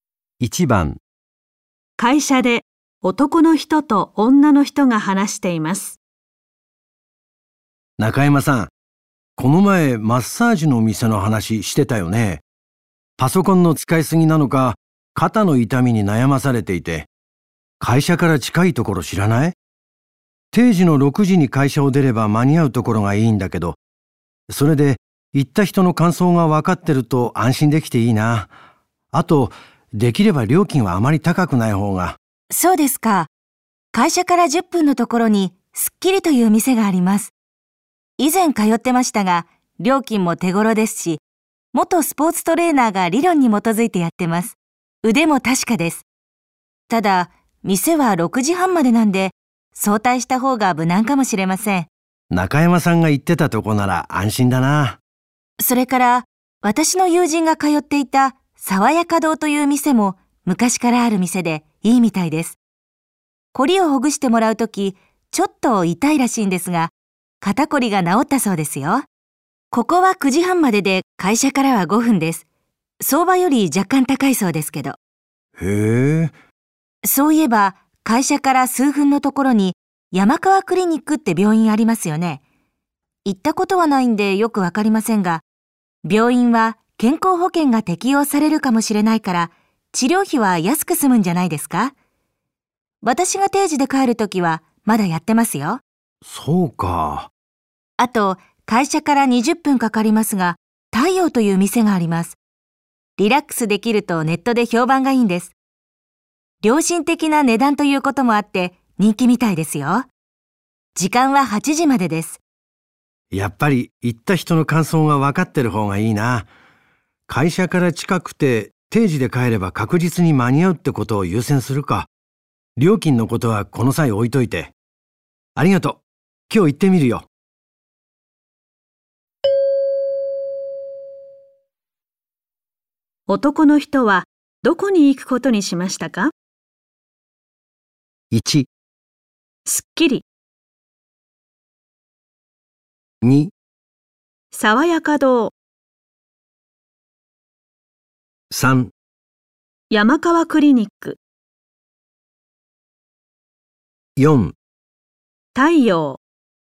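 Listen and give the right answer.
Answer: 2: 爽やか堂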